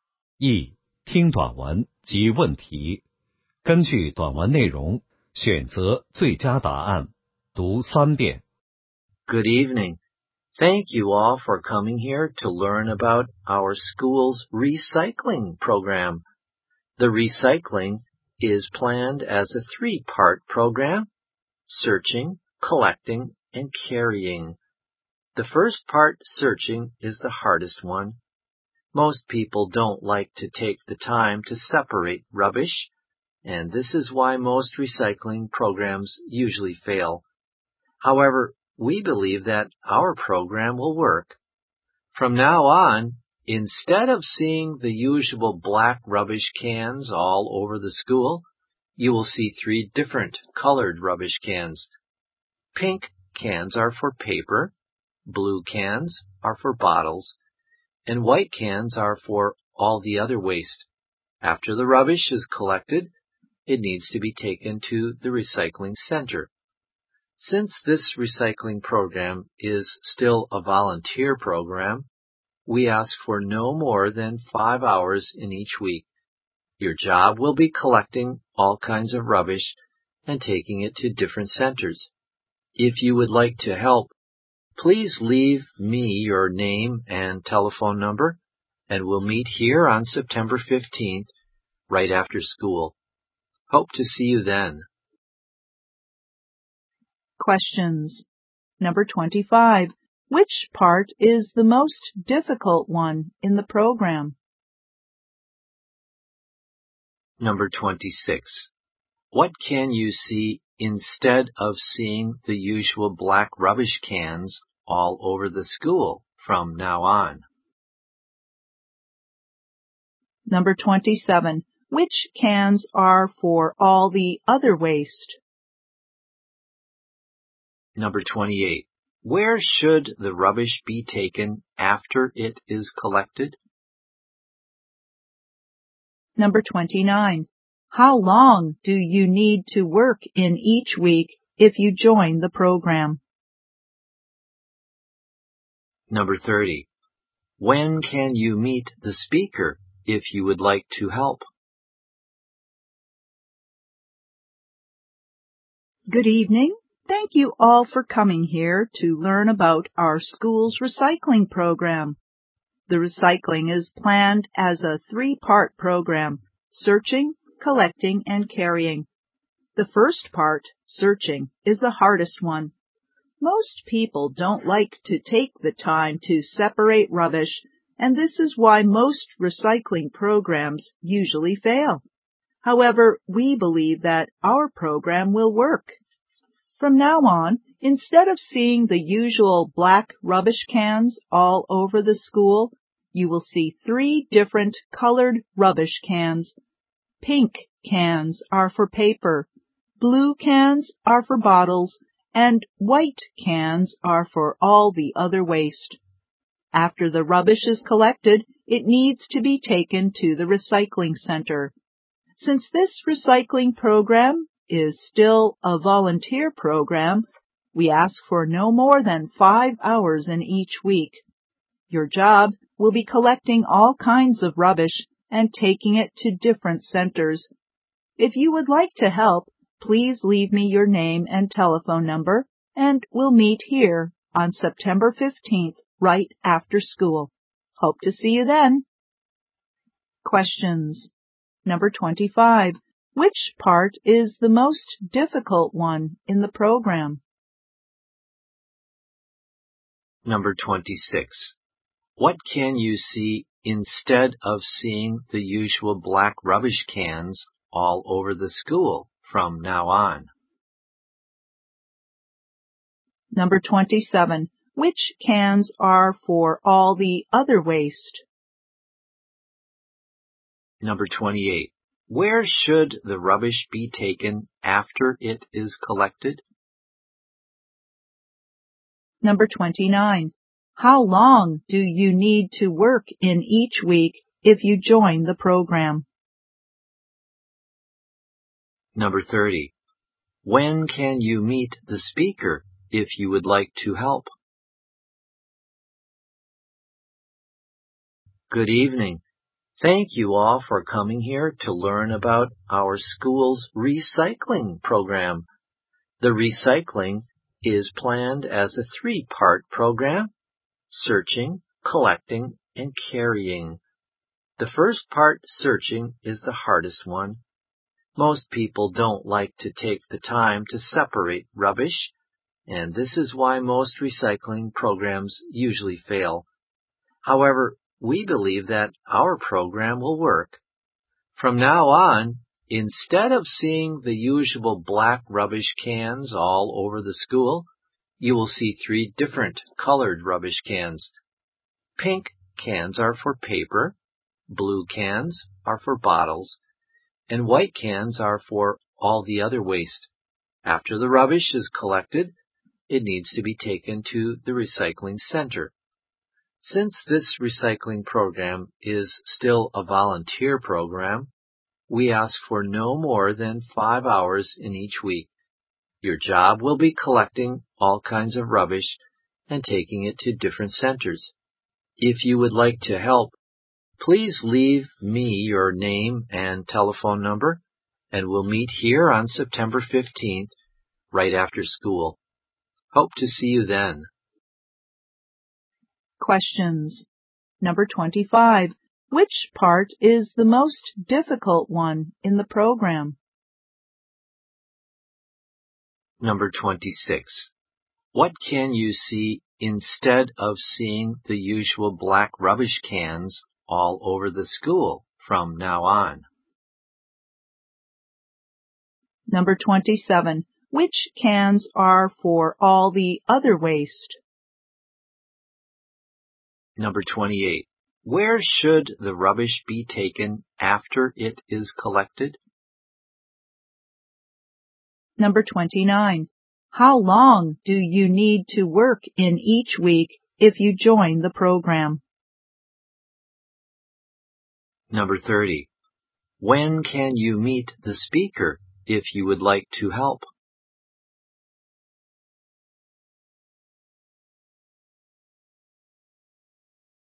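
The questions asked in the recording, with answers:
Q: Which part is the most difficult one in the program?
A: Searching

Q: What can you see instead of seeing the usual black rubbish cans all over the school from now on?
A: Three different colored rubbish cans

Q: Which cans are for all the other waste?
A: White cans

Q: Where should the rubbish be taken after it is collected?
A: To the recycling center

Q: How long do you need to work in each week if you join the program?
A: No more than 5 hours

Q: When can you meet the speaker if you would like to help?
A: On September 15th, right after school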